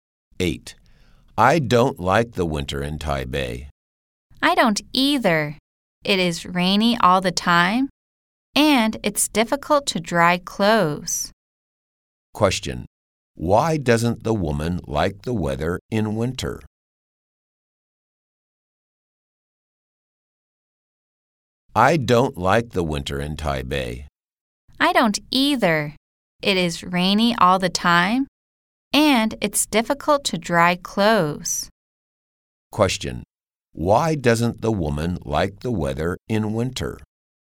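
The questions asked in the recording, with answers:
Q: Question. Why doesn't the woman like the weather in winter?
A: It's rainy all the time, and it's difficult to dry clothes.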